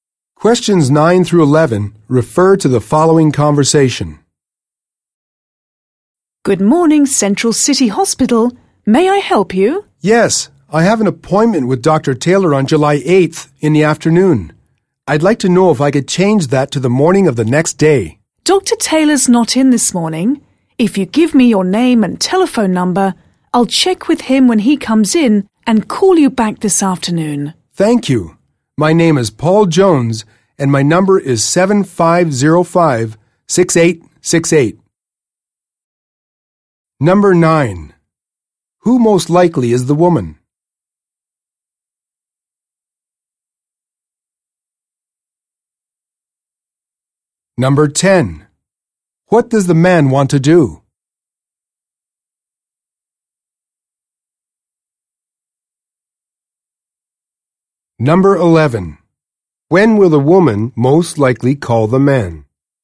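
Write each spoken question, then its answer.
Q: Who most likely is the woman?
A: A hospital receptionist

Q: What does the man want to do?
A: Change his appointment to the morning of July 9th

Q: When will the woman most likely call the man?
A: This afternoon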